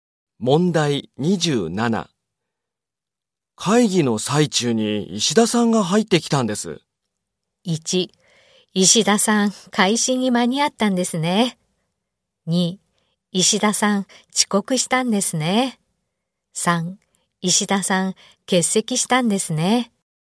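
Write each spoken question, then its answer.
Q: 会議の最中に石田さんが入ってきたんです。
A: 2: 石田さん、遅刻したんですね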